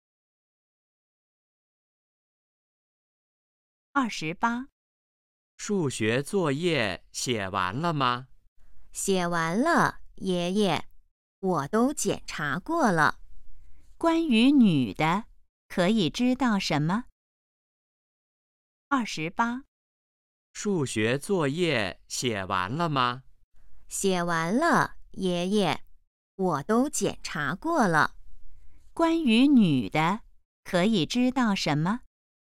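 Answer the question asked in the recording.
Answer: 数学作业写完了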